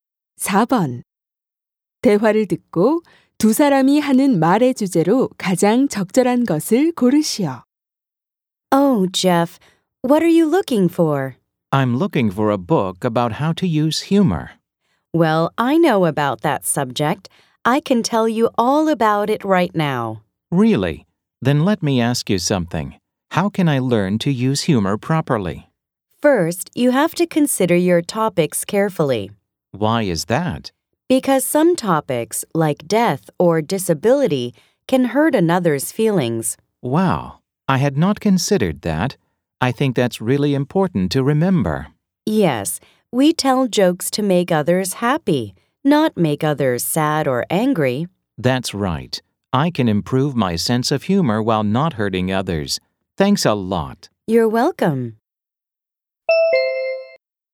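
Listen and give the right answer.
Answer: 유머를 적절하게 사용하는 방법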